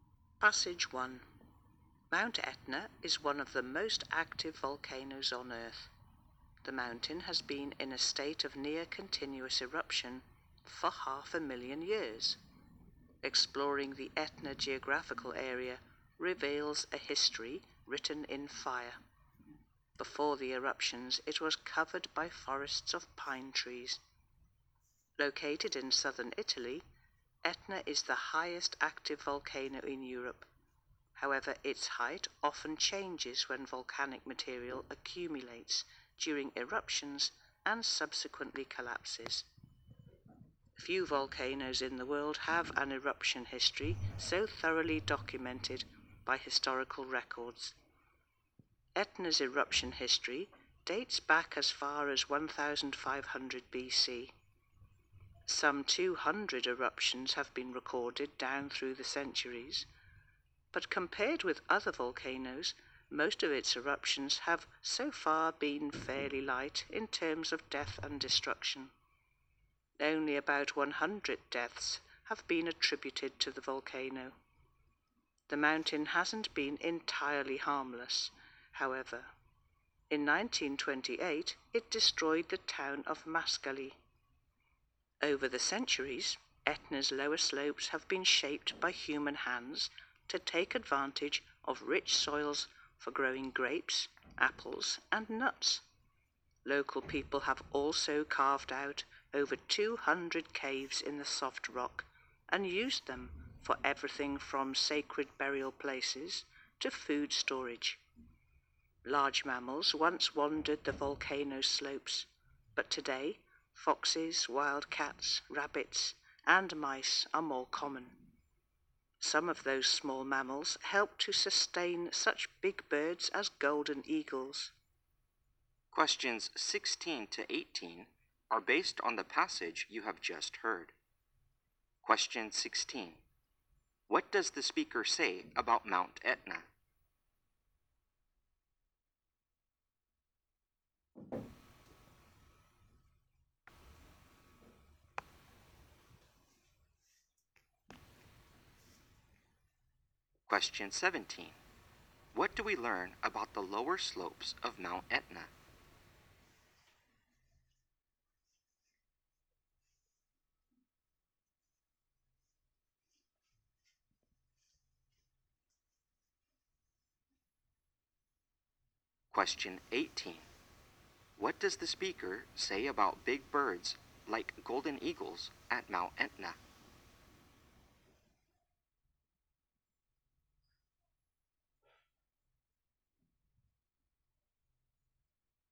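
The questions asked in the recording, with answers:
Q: What do we learn about the lower slopes of Mount Etna?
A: They have been shaped by people to use the rich soils for growing grapes, apples and nuts

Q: What does the speaker say about big birds like golden eagles at Mount Etna?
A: Small mammals there help to sustain them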